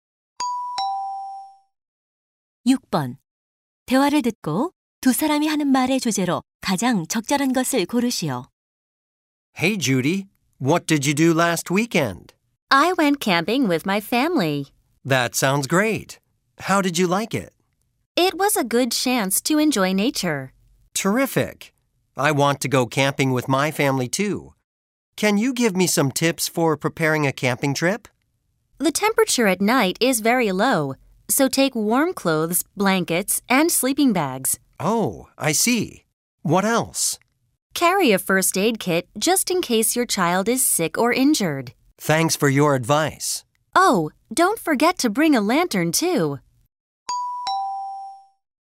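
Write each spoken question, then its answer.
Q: 대화를 듣고 두 사람이 하는 말의 주제로 가장 적절한 것을 고르시오.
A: 캠핑 준비 요령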